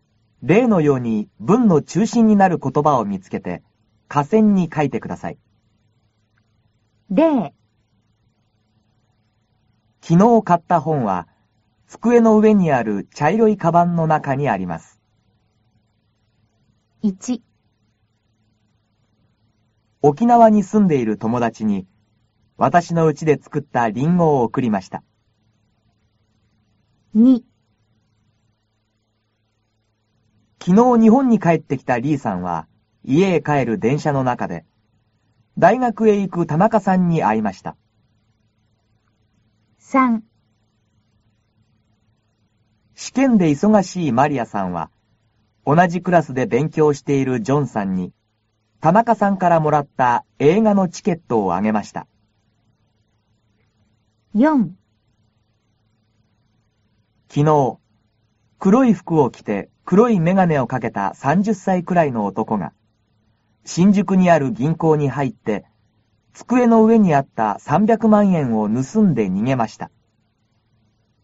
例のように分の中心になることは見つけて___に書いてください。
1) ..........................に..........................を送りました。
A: ともだち、りんご

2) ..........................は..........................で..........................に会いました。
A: リーさん、でんしゃのなか、たなかさん

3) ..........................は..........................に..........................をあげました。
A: マリアさん、ジョンさん、チケット

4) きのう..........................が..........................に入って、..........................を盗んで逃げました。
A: おとこ、ぎんこう、300まんえん